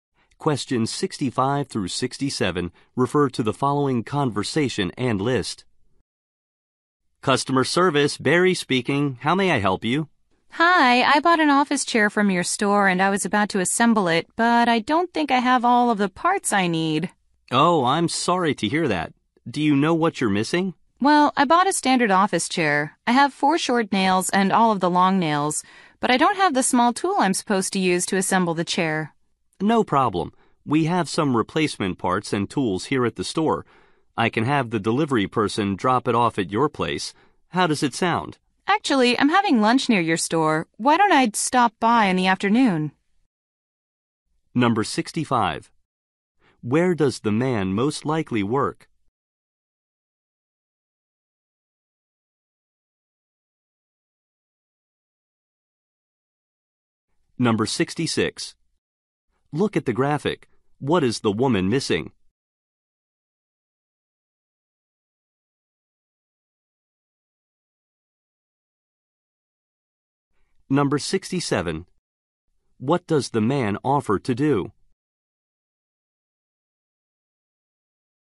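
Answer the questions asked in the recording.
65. At a store's customer service
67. Have a delivery person drop off the part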